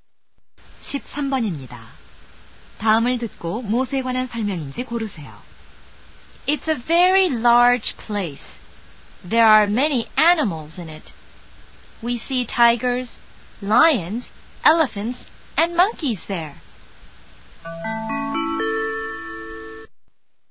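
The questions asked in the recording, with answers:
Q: 다음을 듣고 무엇에 관한 설명인지 고르세요.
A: 동물원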